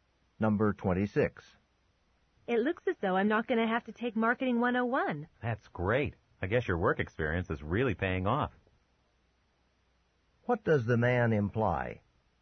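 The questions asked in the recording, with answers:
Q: What does the man imply?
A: The woman's work experience got her out of Marketing 101.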